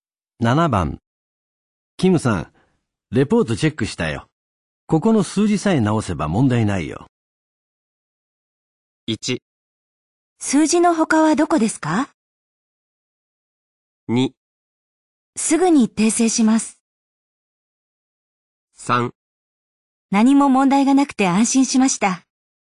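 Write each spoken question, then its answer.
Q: キムさん、レポートチェックしたよ。ここの数字さえ直せば問題ないよ。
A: 2: すぐに訂正します。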